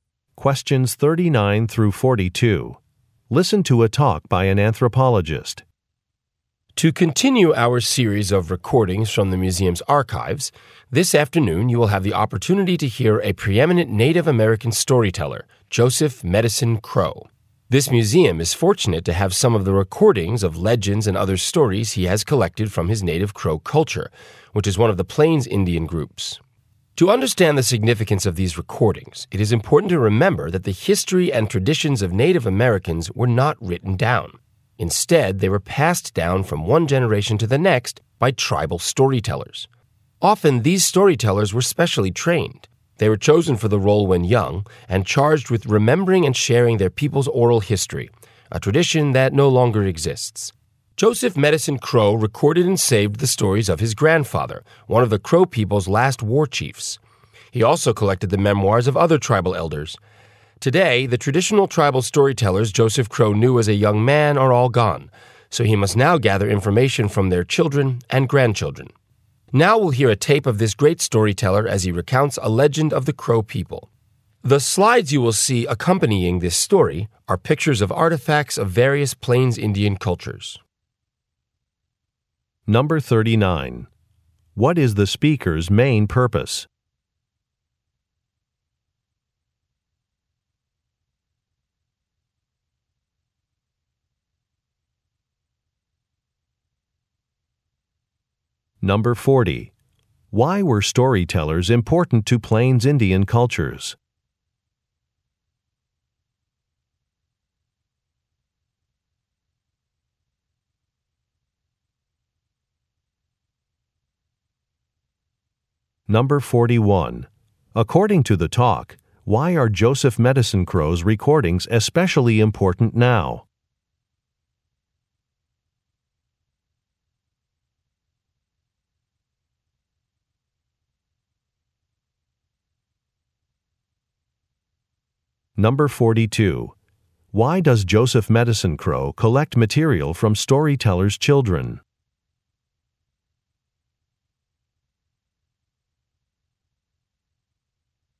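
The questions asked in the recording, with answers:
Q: What is the speaker's main purpose?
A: To introduce recordings of the Native American storyteller Joseph Medicine Crow

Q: Why were storytellers important to Plains Indian cultures?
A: They passed down the unwritten history and traditions from one generation to the next

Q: According to the talk, why are Joseph Medicine Crow's recordings especially important now?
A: The traditional tribal storytellers are all gone and the tradition no longer exists

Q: Why does Joseph Medicine Crow collect material from storytellers' children?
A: Because the traditional storytellers he knew are all gone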